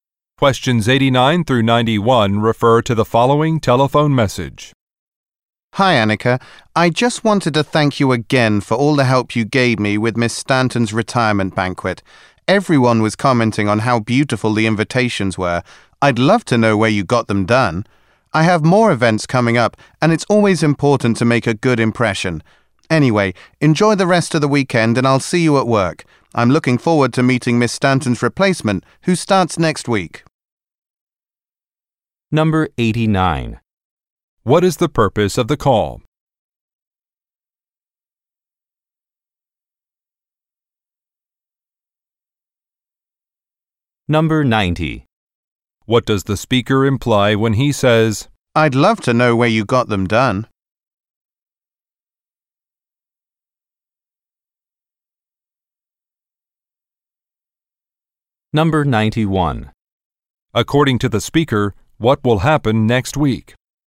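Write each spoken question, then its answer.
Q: What is the purpose of the call?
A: To thank Annika for helping with the retirement banquet

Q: "I'd love to know where you got them done"?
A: He wants to use the same place to make invitations

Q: According to the speaker, what will happen next week?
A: Miss Stanton's replacement will start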